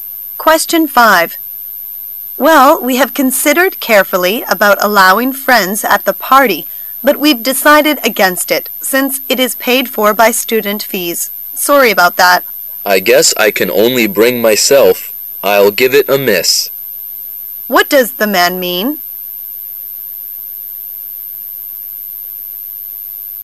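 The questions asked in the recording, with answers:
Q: What does the man mean?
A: He won't go to the party.

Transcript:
[解析] W: Well, we have considered carefully about allowing friends at the party, but we've decided against it since it is paid for by student fees. Sorry about that. M: I guess I can only bring myself. I'll give it a miss. Q: What does the man mean?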